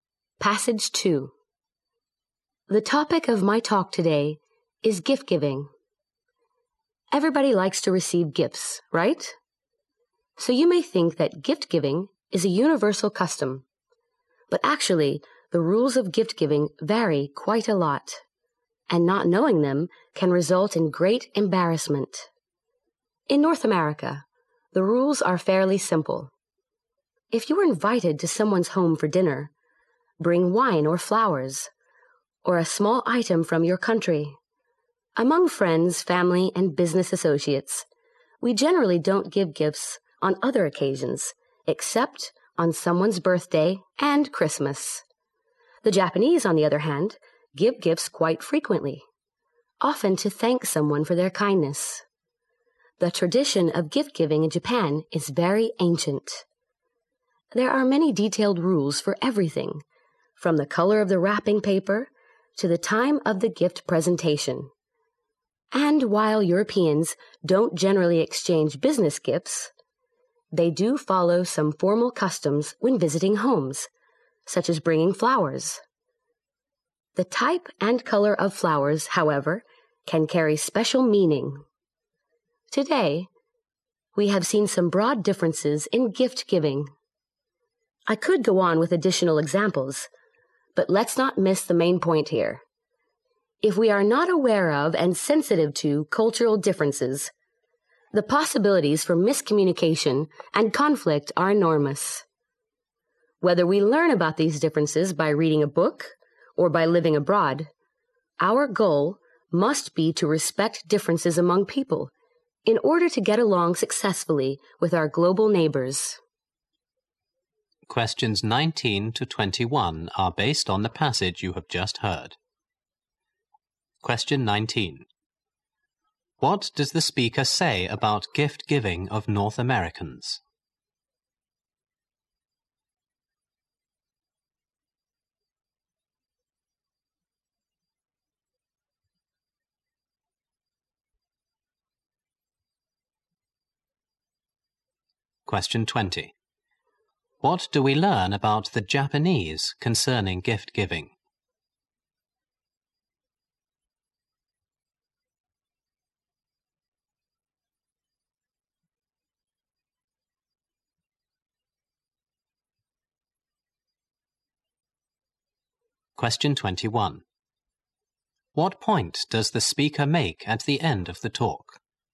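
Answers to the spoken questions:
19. The rules are fairly simple.
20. They give gifts often, usually to thank people for kindness.
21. We should respect cultural differences to get along with others.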